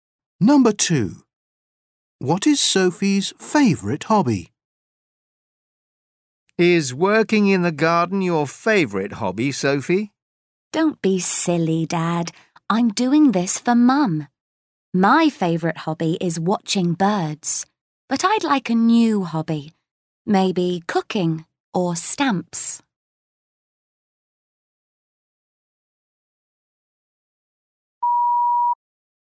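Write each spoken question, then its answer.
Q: What is Sophie's favourite hobby?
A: Watching birds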